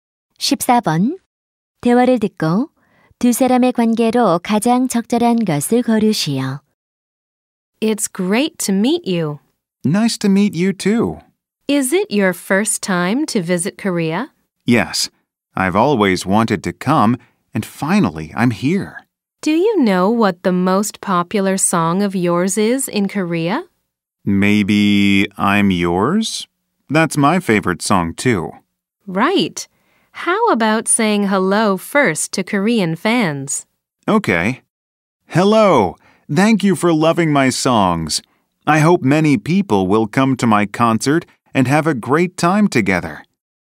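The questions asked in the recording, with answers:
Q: 대화를 듣고 두 사람의 관계로 가장 적절한 것을 고르시오.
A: 인터뷰 진행자 – 가수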